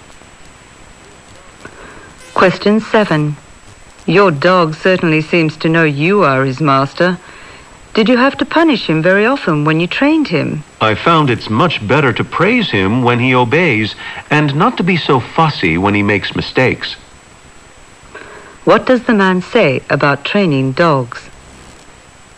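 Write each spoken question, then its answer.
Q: What does the man say about training dogs?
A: Praise them when they obey rather than punishing mistakes.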